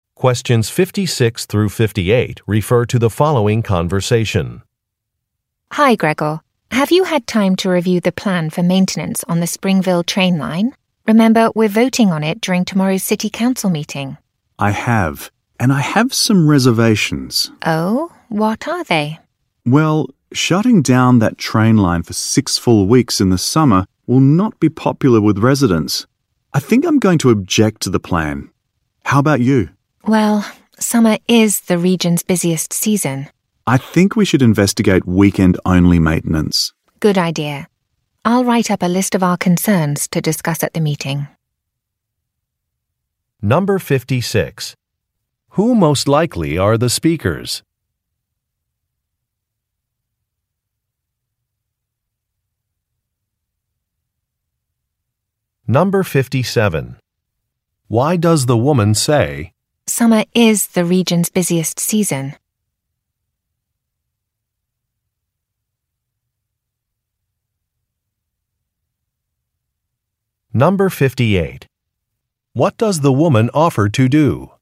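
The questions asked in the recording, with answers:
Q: Who most likely are the speakers?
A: City council members

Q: Why does the woman say, "Summer is the region's busiest season"?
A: To agree that a six-week summer shutdown is a bad idea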